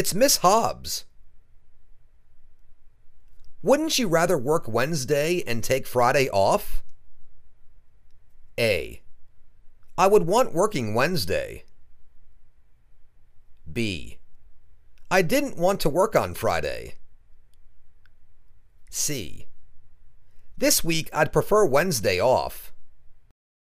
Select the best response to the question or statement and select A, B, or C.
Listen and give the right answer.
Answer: This week I'd prefer Wednesday off.